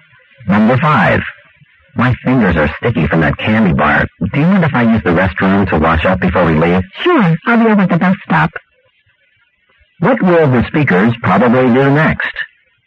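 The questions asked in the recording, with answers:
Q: What will the speakers probably do next?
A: The man will wash up and the woman will wait at the bus stop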